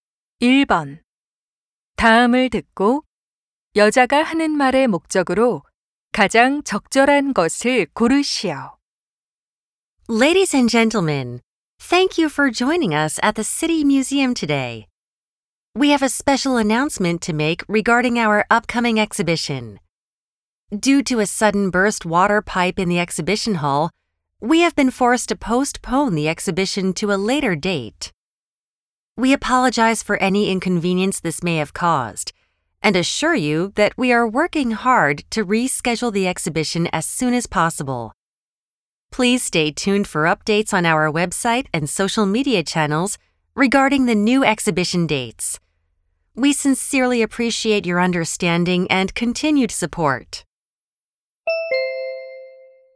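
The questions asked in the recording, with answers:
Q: 다음을 듣고 여자가 하는 말의 목적으로 가장 적절한 것을 고르시오.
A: 수도관 파열로 전시회가 연기되었음을 알리려고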